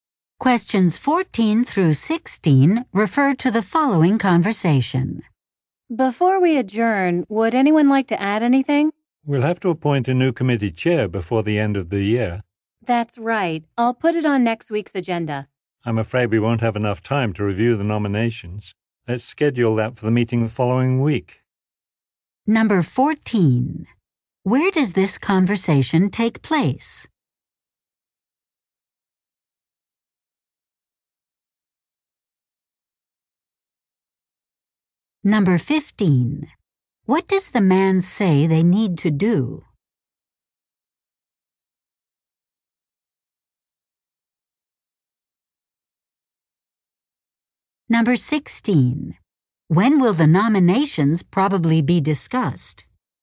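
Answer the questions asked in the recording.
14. At a meeting
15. Appoint a new committee chair before the end of the year
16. At the meeting in two weeks (the week after next)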